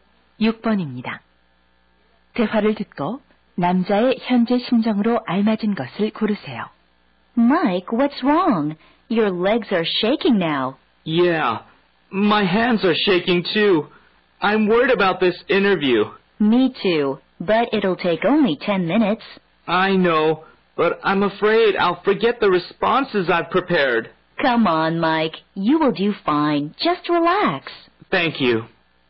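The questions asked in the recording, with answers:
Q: 대화를 듣고 남자의 현재 심정으로 알맞은 것을 고르세요.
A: 긴장됨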